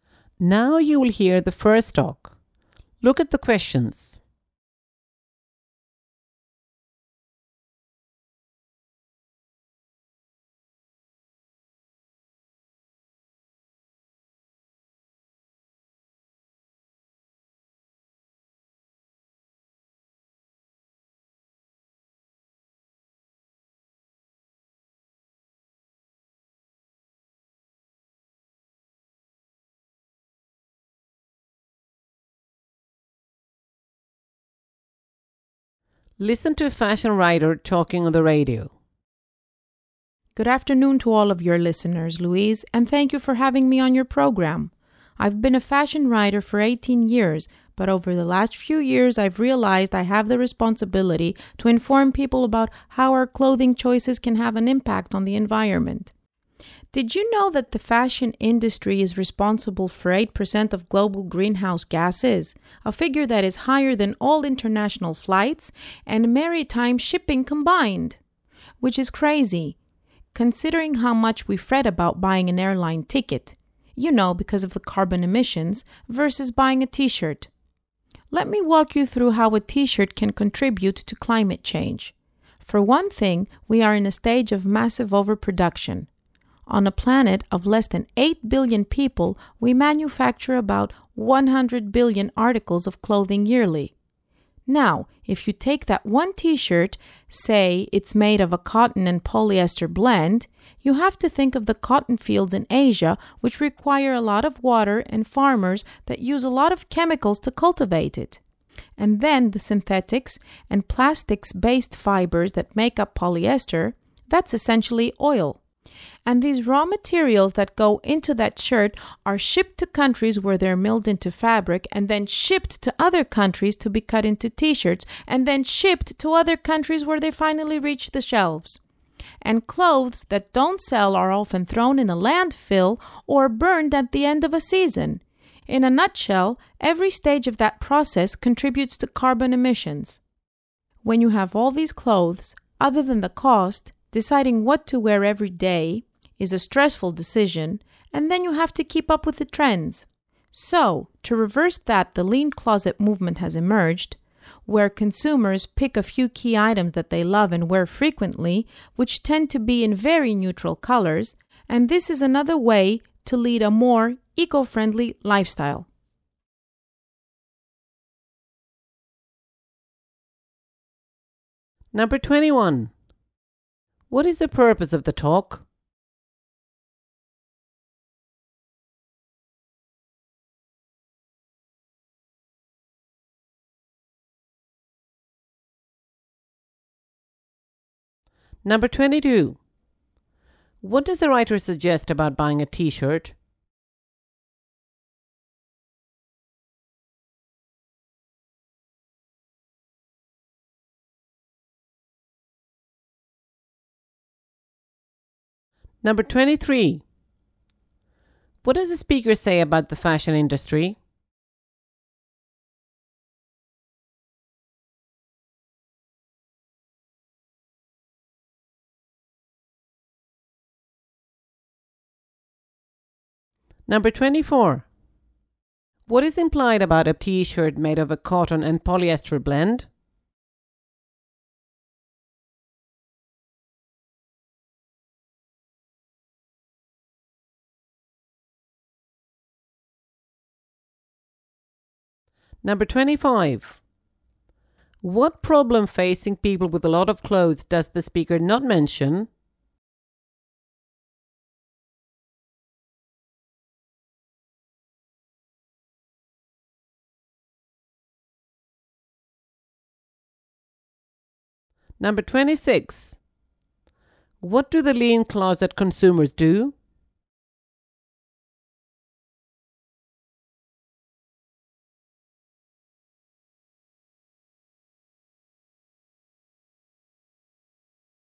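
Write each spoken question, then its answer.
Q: What is the purpose of the talk?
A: To inform people about how clothing choices affect the environment

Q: What does the writer suggest about buying a t-shirt?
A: People worry less about it than about buying an airline ticket, though it also contributes to carbon emissions

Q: What does the speaker say about the fashion industry?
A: It produces 8% of global greenhouse gases, more than international flights and shipping combined

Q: What do the lean closet consumers do?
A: They choose a few key items, usually in neutral colours, that they love and wear often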